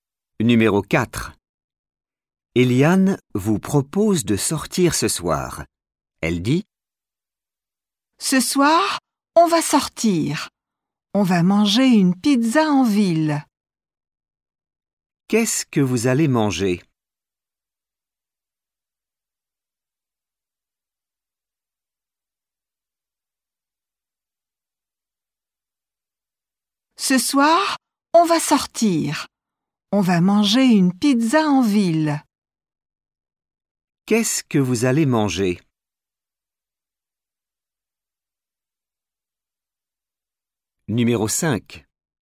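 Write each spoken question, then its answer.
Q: Qu'est-ce que vous allez manger ?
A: Une pizza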